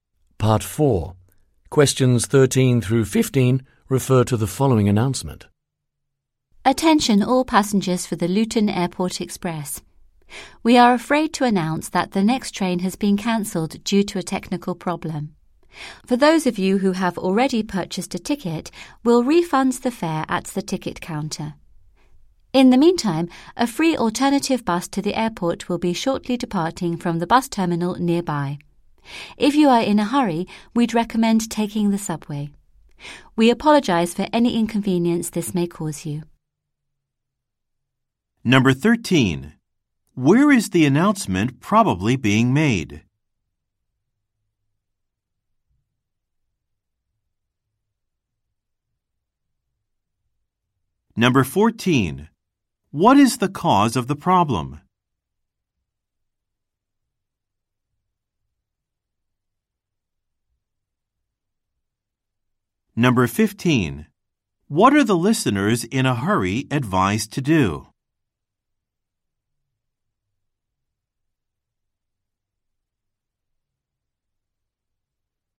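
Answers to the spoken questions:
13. At a train station
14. A technical problem
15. Take the subway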